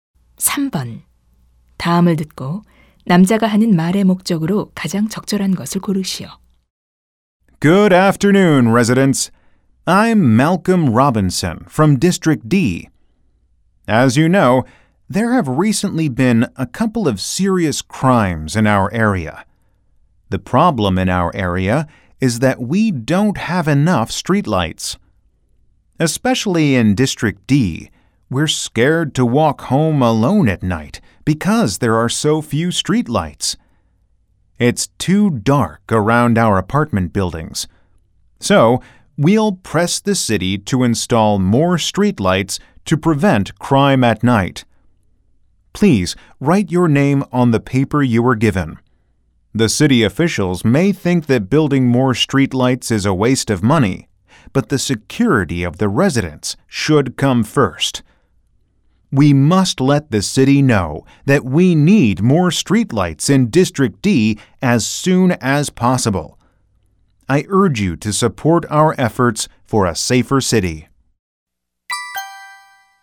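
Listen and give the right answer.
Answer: 가로등 추가 설치 요구에 대한 주민들의 지지를 호소하려고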